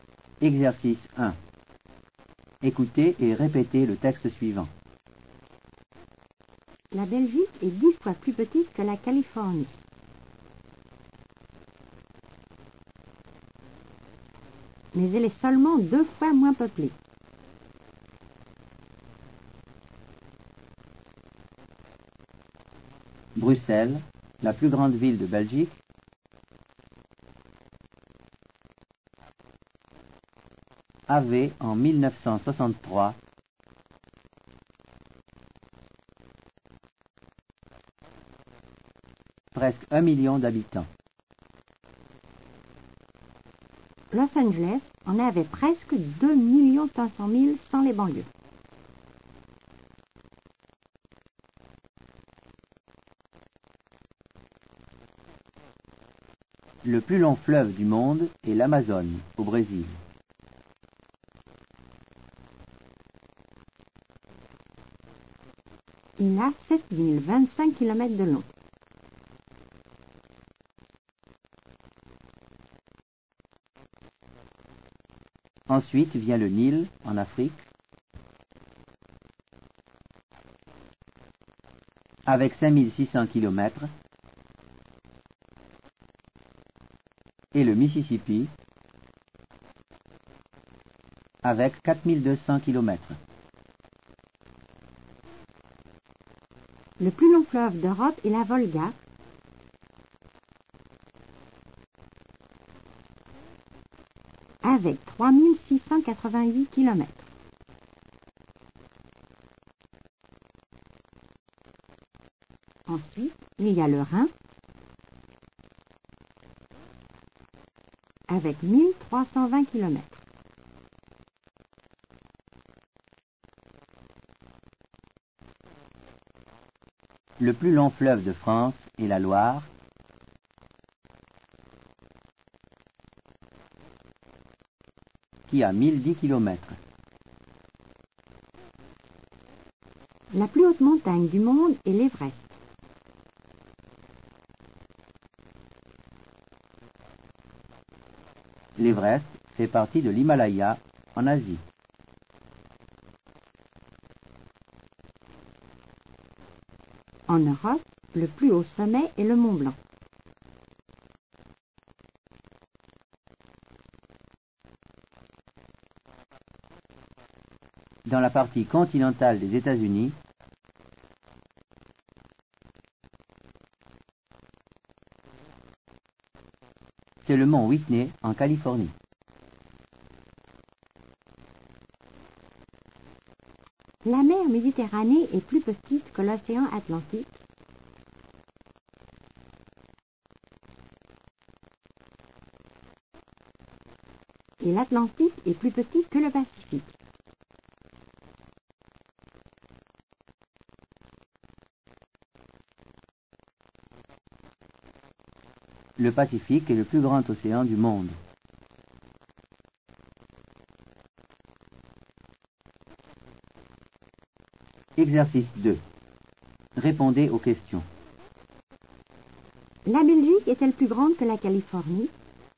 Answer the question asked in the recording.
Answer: Non, la Belgique est 10 fois plus petite que la Californie.